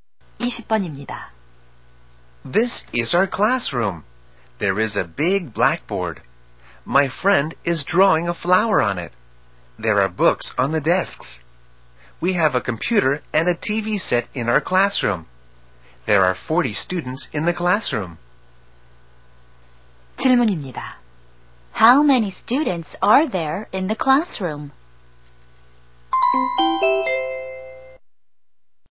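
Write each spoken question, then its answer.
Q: How many students are there in the classroom?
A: 40 students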